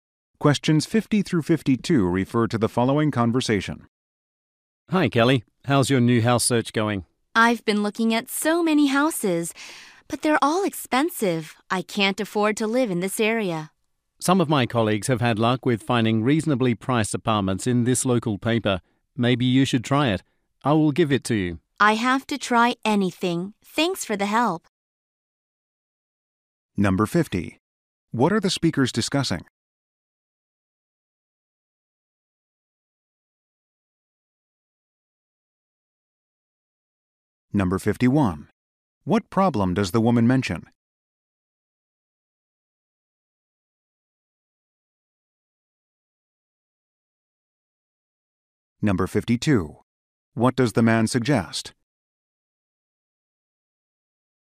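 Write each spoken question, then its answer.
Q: What are the speakers discussing?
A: The woman's search for a new house

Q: What problem does the woman mention?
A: Houses in the area are too expensive

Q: What does the man suggest?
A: Looking in the local paper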